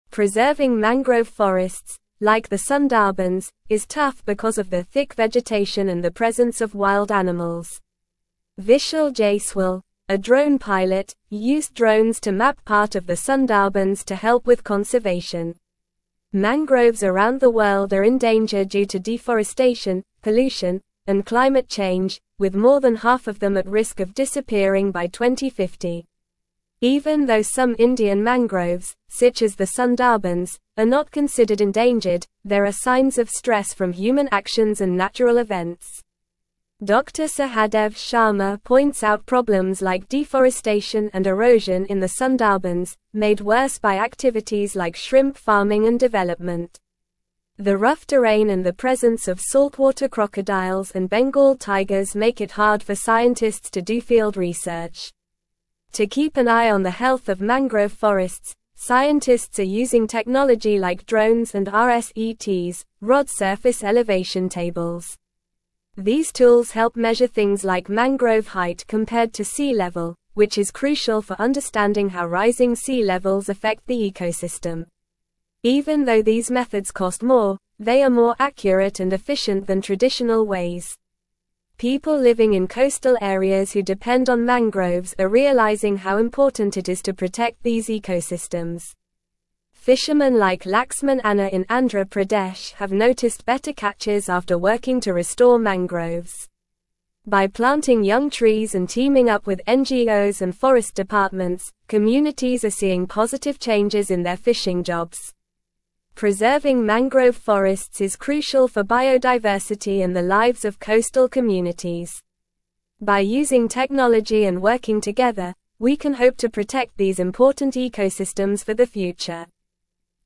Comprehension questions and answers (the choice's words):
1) Preserving mangrove (1)______, like the (2)______, is tough because of their thick (3)______ and the presence of wild animals.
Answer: forests

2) Preserving mangrove (1)______, like the (2)______, is tough because of their thick (3)______ and the presence of wild animals.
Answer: Sundarbans

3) Preserving mangrove (1)______, like the (2)______, is tough because of their thick (3)______ and the presence of wild animals.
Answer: vegetation

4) Mangroves around the world are in danger due to deforestation, pollution, and (4)______ change, with more than half of them at risk of disappearing by 2050.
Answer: climate

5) Even though some Indian mangroves, such as the Sundarbans, are not considered endangered, there are signs of stress from human actions and (5)______ events.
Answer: natural

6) Dr. Sahadev Sharma points out problems like deforestation and (6)______ in the Sundarbans, made worse by activities like shrimp farming and development.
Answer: erosion

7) The (7)______ terrain and the (8)______ of saltwater crocodiles and Bengal tigers make it hard for scientists to do field research.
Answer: rough

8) The (7)______ terrain and the (8)______ of saltwater crocodiles and Bengal tigers make it hard for scientists to do field research.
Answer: presence

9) To keep an eye on the health of mangrove forests, scientists are using technology like drones and rSETs (rod (9)______ elevation tables).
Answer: surface

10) These tools help measure things like mangrove (10)______ compared to sea level, which is crucial for (11)______ how rising sea levels affect the ecosystem.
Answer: height

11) These tools help measure things like mangrove (10)______ compared to sea level, which is crucial for (11)______ how rising sea levels affect the ecosystem.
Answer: understanding

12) People (12)______ in coastal areas who depend on mangroves are realizing how important it is to protect these ecosystems.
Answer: living

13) Fishermen like (13)______ Anna in Andhra Pradesh have noticed better (14)______ after (15)______ to restore mangroves.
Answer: Laxman

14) Fishermen like (13)______ Anna in Andhra Pradesh have noticed better (14)______ after (15)______ to restore mangroves.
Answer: catches

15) Fishermen like (13)______ Anna in Andhra Pradesh have noticed better (14)______ after (15)______ to restore mangroves.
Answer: working

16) Preserving mangrove forests is (16)______ for biodiversity and the lives of coastal communities.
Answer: crucial

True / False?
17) Dr. Sahadev Sharma highlighted issues like deforestation and erosion in the Sundarbans, worsened by activities such as shrimp farming.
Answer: True

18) Mangrove forests worldwide are at risk of disappearing by 2050 due to deforestation, pollution, and climate change.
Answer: True

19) Coastal communities are recognizing the importance of protecting mangrove ecosystems for their livelihoods, as seen in the case of fisherman Laxman Anna in Andhra Pradesh.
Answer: True

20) Scientists are using drones and rSETs to monitor the health of mangrove forests, measuring things like mangrove height compared to sea level.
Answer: True

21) By employing technology and partnering with NGOs and forest departments, attempts are not being made to conserve mangrove forests for the future.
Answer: False

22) What did Vishal Jaiswal use drones for in the Sundarbans?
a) To scare away wild animals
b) To map part of the area for conservation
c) To cut down trees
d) To build houses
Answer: To map part of the area for conservation

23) Why are mangrove forests like the Sundarbans in danger?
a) Because of too much rain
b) Because of too much sunlight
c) Due to lack of water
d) Due to deforestation, pollution, and climate change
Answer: Due to deforestation, pollution, and climate change

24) What is one of the problems faced by scientists doing field research in the Sundarbans?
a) Lack of trees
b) Presence of saltwater crocodiles and Bengal tigers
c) Easy access to the area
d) Mild weather conditions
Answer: Presence of saltwater crocodiles and Bengal tigers

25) What technology are scientists using to monitor the health of mangrove forests?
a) Drones and rSETs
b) Fishing nets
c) Binoculars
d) Compasses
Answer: Drones and rSETs

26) What do drones and rSETs help measure in mangrove forests?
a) Mangrove height compared to sea level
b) Number of birds in the area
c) Amount of rainfall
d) Types of fish in the water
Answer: Mangrove height compared to sea level

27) How are coastal communities benefiting from restoring mangroves?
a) Seeing more wild animals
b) Experiencing more pollution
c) Experiencing less rain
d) Seeing better catches for fishermen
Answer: Seeing better catches for fishermen

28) Why is preserving mangrove forests crucial?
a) To build more houses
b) To make more money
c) For biodiversity and the lives of coastal communities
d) To attract tourists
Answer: For biodiversity and the lives of coastal communities

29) What is one way communities are working to protect mangrove ecosystems?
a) By cutting down trees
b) By building factories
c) By planting young trees and teaming up with NGOs and forest departments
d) By polluting the water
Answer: By planting young trees and teaming up with NGOs and forest departments

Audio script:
Preserving mangrove forests, like the Sundarbans, is tough because of their thick vegetation and the presence of wild animals. Vishal Jaiswal, a drone pilot, used drones to map part of the Sundarbans to help with conservation. Mangroves around the world are in danger due to deforestation, pollution, and climate change, with more than half of them at risk of disappearing by 2050.
Even though some Indian mangroves, such as the Sundarbans, are not considered endangered, there are signs of stress from human actions and natural events. Dr. Sahadev Sharma points out problems like deforestation and erosion in the Sundarbans, made worse by activities like shrimp farming and development. The rough terrain and the presence of saltwater crocodiles and Bengal tigers make it hard for scientists to do field research.
To keep an eye on the health of mangrove forests, scientists are using technology like drones and rSETs (rod surface elevation tables). These tools help measure things like mangrove height compared to sea level, which is crucial for understanding how rising sea levels affect the ecosystem. Even though these methods cost more, they are more accurate and efficient than traditional ways.
People living in coastal areas who depend on mangroves are realizing how important it is to protect these ecosystems. Fishermen like Laxman Anna in Andhra Pradesh have noticed better catches after working to restore mangroves. By planting young trees and teaming up with NGOs and forest departments, communities are seeing positive changes in their fishing jobs. Preserving mangrove forests is crucial for biodiversity and the lives of coastal communities. By using technology and working together, we can hope to protect these important ecosystems for the future.

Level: Level 3